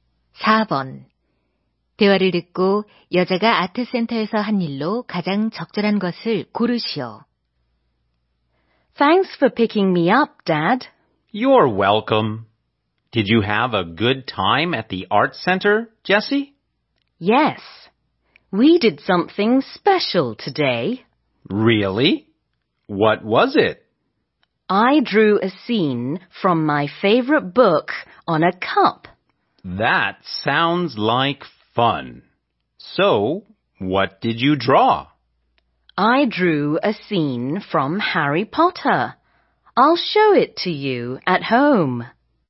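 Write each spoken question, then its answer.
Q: 대화를 듣고 여자가 아트센터에서 한 일로 가장 적절한 것을 고르시오.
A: 컵에 좋아하는 책의 한 장면을 그렸다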